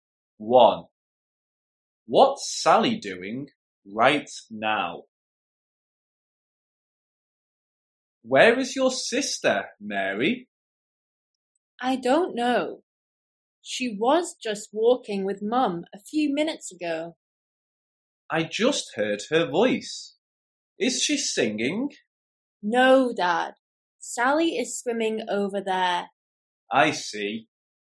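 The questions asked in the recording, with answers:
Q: What's Sally doing right now?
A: Swimming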